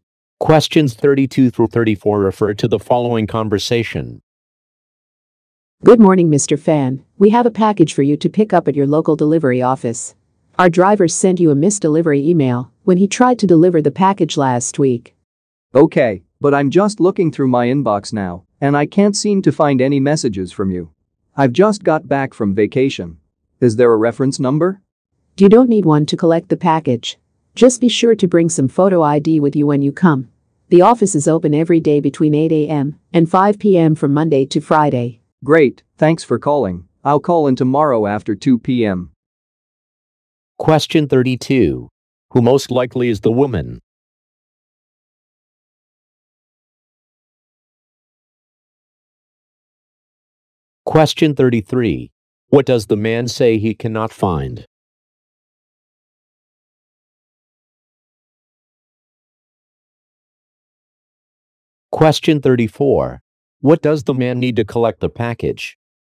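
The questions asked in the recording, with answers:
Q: Who most likely is the woman?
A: A delivery company employee

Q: What does the man say he cannot find?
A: The missed delivery email

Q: What does the man need to collect the package?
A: Photo ID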